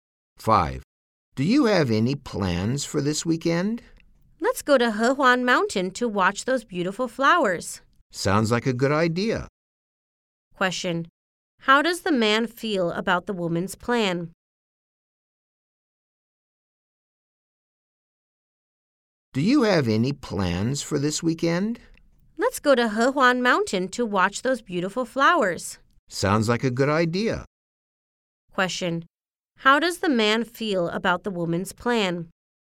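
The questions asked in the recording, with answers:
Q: How does the man feel about the woman's plan?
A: He thinks it's a good idea.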